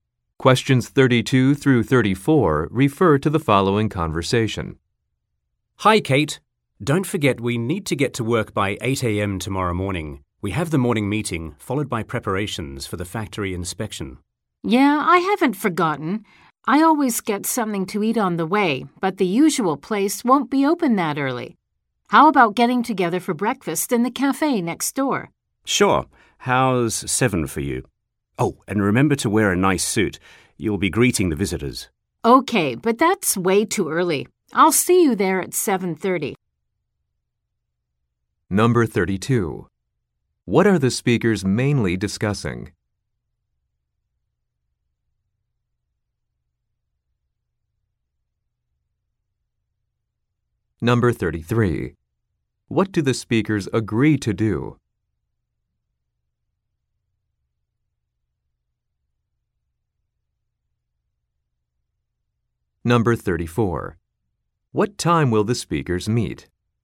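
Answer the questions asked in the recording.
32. Getting to work early tomorrow and meeting for breakfast
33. Have breakfast together at the cafe next door
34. 7:30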